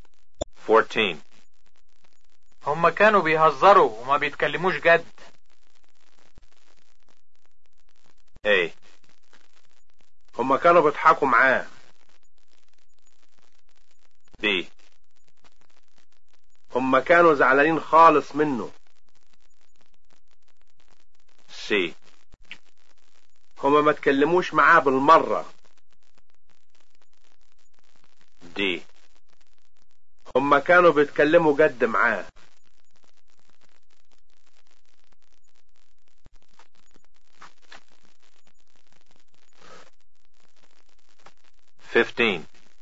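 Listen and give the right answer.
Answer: A: هم كانوا بيضحكوا معاه.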